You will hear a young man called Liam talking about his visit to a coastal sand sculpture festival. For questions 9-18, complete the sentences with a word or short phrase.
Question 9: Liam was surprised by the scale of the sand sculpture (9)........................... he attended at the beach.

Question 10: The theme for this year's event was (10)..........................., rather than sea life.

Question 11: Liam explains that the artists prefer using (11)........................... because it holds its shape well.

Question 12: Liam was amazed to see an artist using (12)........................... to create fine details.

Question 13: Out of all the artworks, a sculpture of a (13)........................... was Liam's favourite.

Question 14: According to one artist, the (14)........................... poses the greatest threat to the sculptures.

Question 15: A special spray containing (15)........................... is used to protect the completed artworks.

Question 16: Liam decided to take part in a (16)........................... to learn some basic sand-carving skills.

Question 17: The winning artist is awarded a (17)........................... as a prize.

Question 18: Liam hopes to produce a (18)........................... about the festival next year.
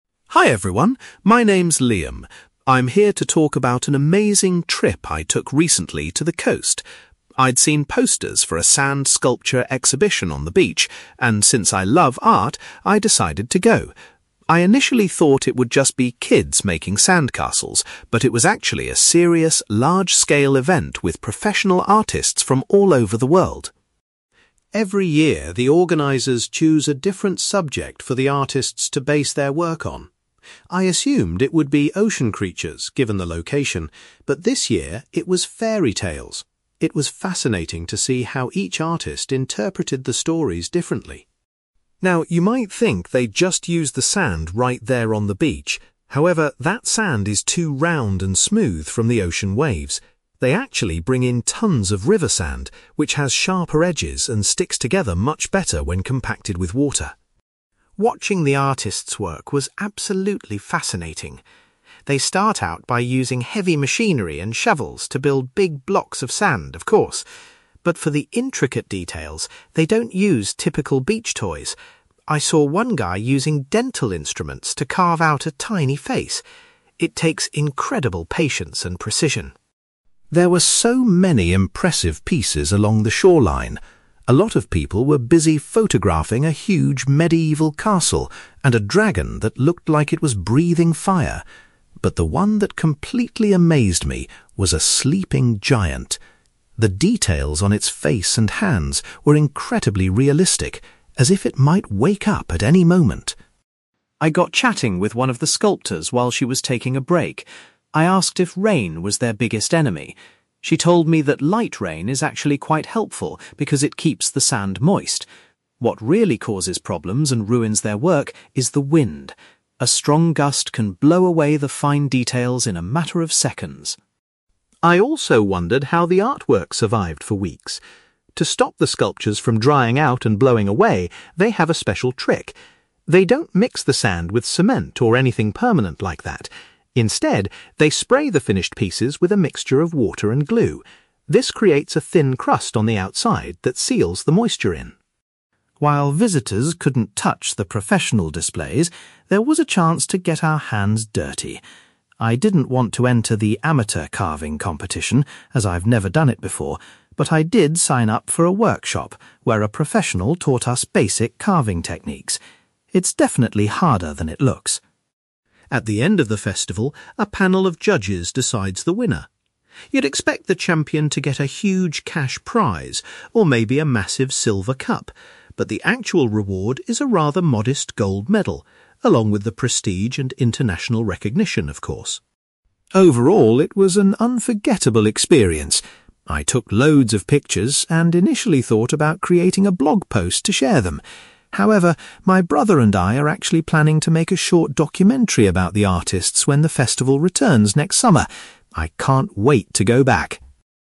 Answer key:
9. exhibition
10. fairy tales
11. river sand
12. dental instruments
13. sleeping giant
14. wind
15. glue
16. workshop
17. gold medal
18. documentary

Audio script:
Liam: Hi everyone, my name's Liam. I'm here to talk about an amazing trip I took recently to the coast. I'd seen posters for a sand sculpture exhibition on the beach, and since I love art, I decided to go. I initially thought it would just be kids making sandcastles, but it was actually a serious, large-scale event with professional artists from all over the world.
Every year, the organisers choose a different subject for the artists to base their work on. I assumed it would be ocean creatures, given the location, but this year it was fairy tales. It was fascinating to see how each artist interpreted the stories differently.
Now, you might think they just use the sand right there on the beach. However, that sand is too round and smooth from the ocean waves. They actually bring in tons of river sand, which has sharper edges and sticks together much better when compacted with water.
Watching the artists work was absolutely fascinating. They start out by using heavy machinery and shovels to build big blocks of sand, of course. But for the intricate details, they don't use typical beach toys. I saw one guy using dental instruments to carve out a tiny face! It takes incredible patience and precision.
There were so many impressive pieces along the shoreline. A lot of people were busy photographing a huge medieval castle, and a dragon that looked like it was breathing fire. But the one that completely amazed me was a sleeping giant. The details on its face and hands were incredibly realistic, as if it might wake up at any moment.
I got chatting with one of the sculptors while she was taking a break. I asked if rain was their biggest enemy. She told me that light rain is actually quite helpful because it keeps the sand moist. What really causes problems and ruins their work is the wind. A strong gust can blow away the fine details in a matter of seconds.
I also wondered how the artwork survived for weeks. To stop the sculptures from drying out and blowing away, they have a special trick. They don't mix the sand with cement or anything permanent like that. Instead, they spray the finished pieces with a mixture of water and glue. This creates a thin crust on the outside that seals the moisture in.
While visitors couldn't touch the professional displays, there was a chance to get our hands dirty. I didn't want to enter the amateur carving competition, as I've never done it before, but I did sign up for a workshop where a professional taught us basic carving techniques. It's definitely harder than it looks!
At the end of the festival, a panel of judges decides the winner. You'd expect the champion to get a huge cash prize or maybe a massive silver cup, but the actual reward is a rather modest gold medal, along with the prestige and international recognition, of course.
Overall, it was an unforgettable experience. I took loads of pictures and initially thought about creating a blog post to share them. However, my brother and I are actually planning to make a short documentary about the artists when the festival returns next summer. I can't wait to go back!

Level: B2